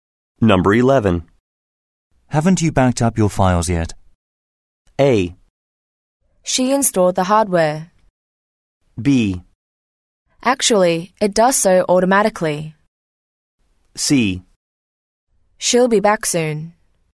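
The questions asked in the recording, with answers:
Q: Haven't you backed up your files yet?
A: B: Actually, it does so automatically.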